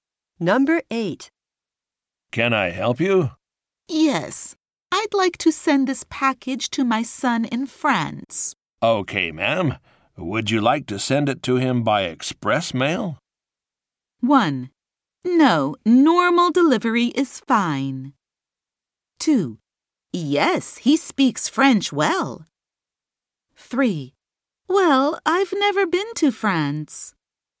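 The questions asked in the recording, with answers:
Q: Okay, ma'am. Would you like to send it to him by express mail?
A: 1: No, normal delivery is fine.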